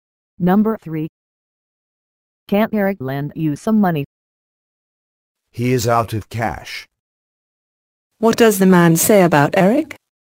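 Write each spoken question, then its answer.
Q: What does the man say about Eric?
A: Eric has no money to lend.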